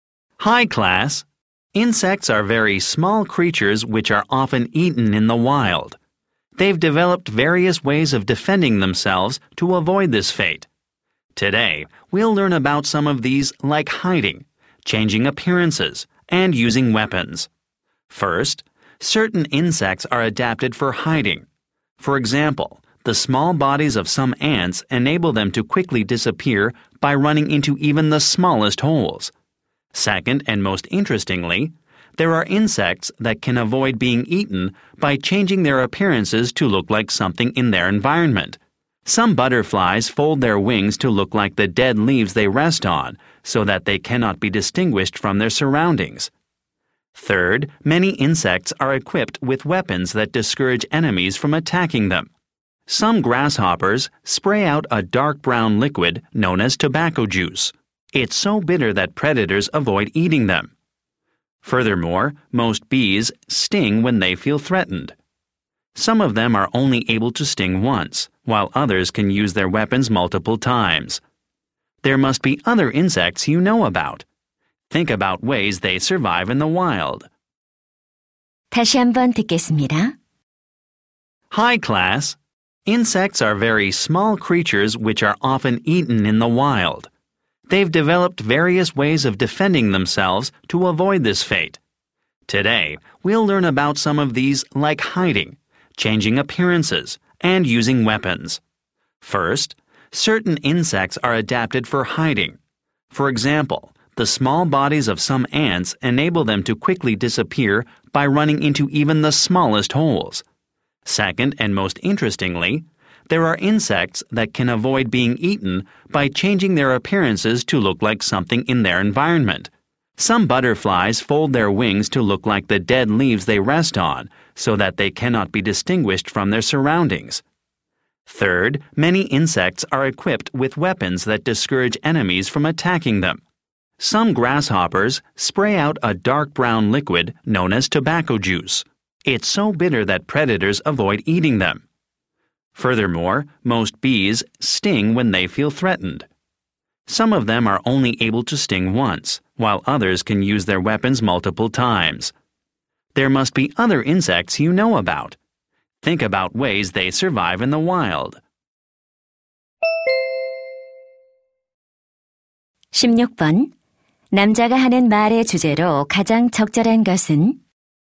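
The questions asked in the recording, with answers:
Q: 남자가 하는 말의 주제로 가장 적절한 것은?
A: 곤충이 스스로를 방어하는 방법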